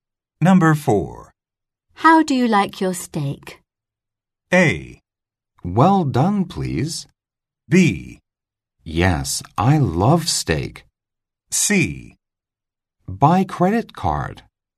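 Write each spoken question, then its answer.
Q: How do you like your steak?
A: A: Well done, please.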